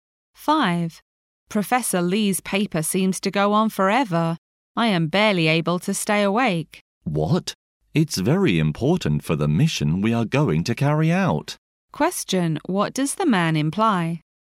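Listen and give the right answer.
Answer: Professor Lee's paper is important and worth listening to.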